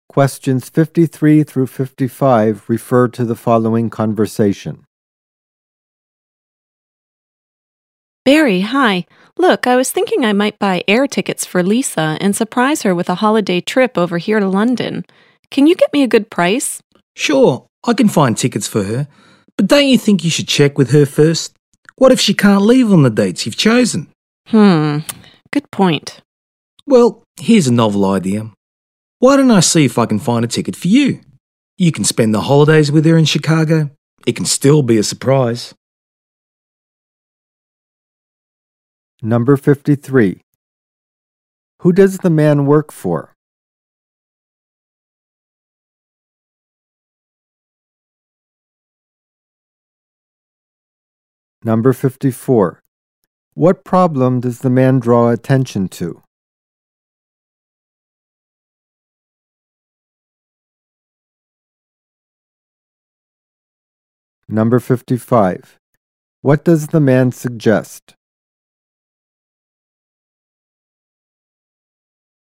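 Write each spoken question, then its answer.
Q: What problem does the man draw attention to?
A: Lisa might not be able to leave on the chosen dates

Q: What does the man suggest?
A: That he find a ticket for the woman to spend the holidays with Lisa in Chicago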